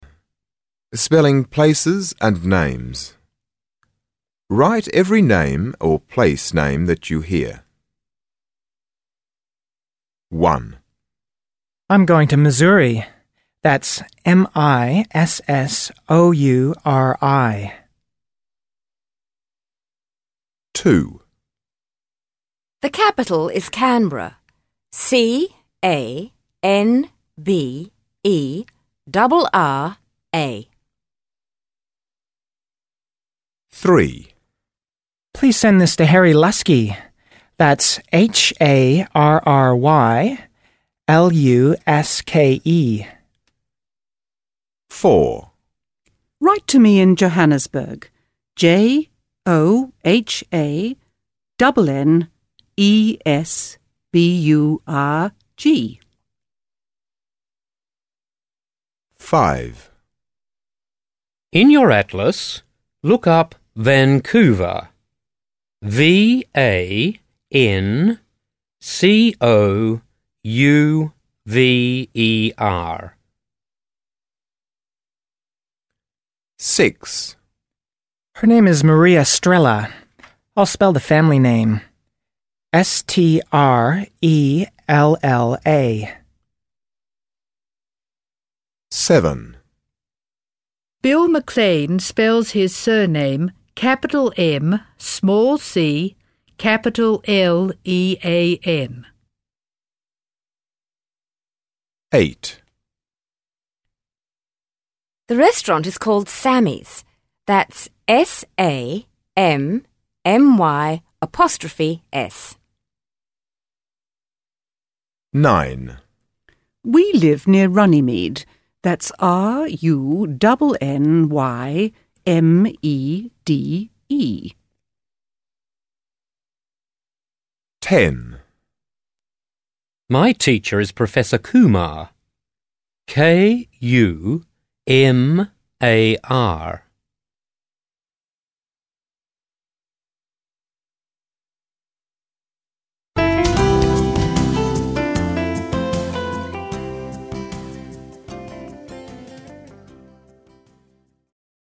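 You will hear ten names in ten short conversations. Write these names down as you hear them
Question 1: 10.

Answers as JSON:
{"1": "Professor Kumar"}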